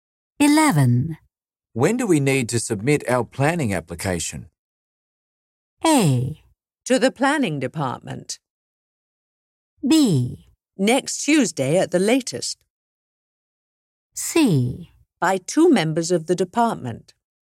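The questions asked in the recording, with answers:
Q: When do we need to submit our planning application?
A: B: Next Tuesday at the latest.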